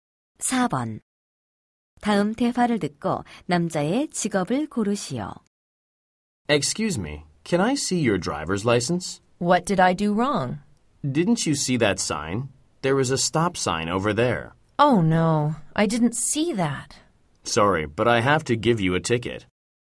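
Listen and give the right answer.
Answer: 경찰관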